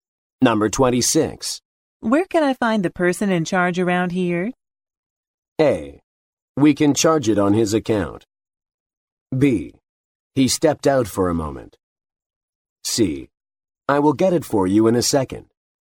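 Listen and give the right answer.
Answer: B: He stepped out for a moment.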